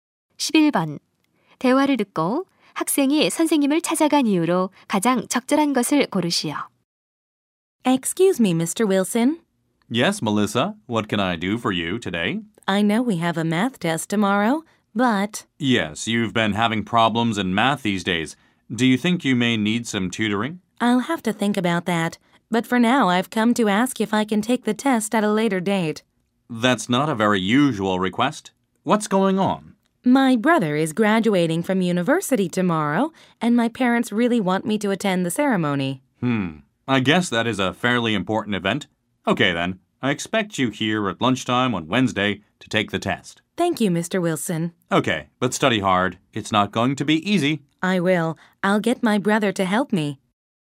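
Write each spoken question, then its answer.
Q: 대화를 듣고 학생이 선생님을 찾아간 이유로 가장 적절한 것을 고르시오.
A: 수학 시험을 나중에 보도록 요청하려고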